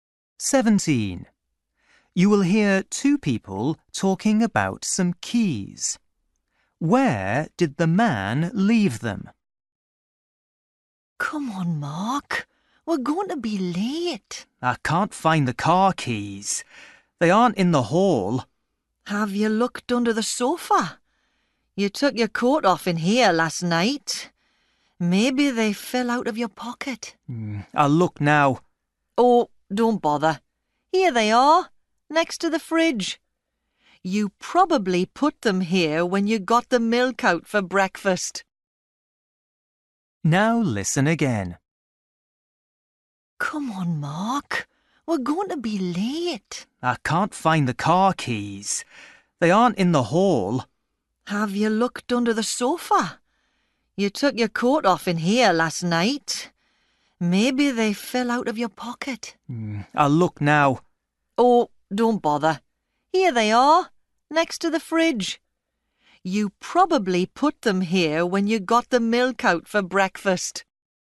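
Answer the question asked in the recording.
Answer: next to the fridge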